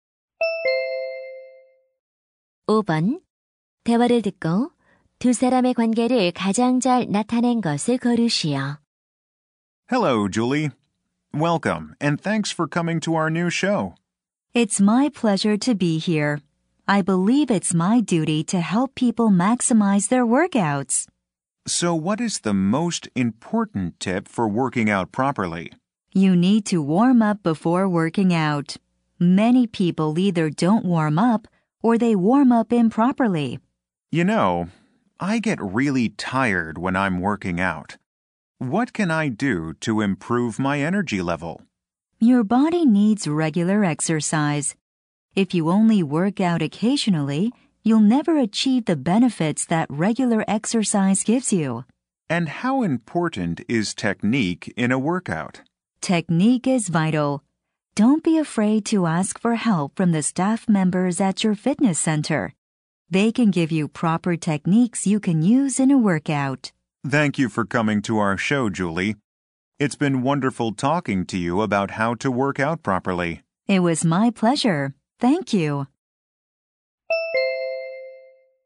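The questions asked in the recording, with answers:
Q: 대화를 듣고 두 사람의 관계를 가장 잘 나타낸 것을 고르시오.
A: 방송 진행자 - 피트니스 전문가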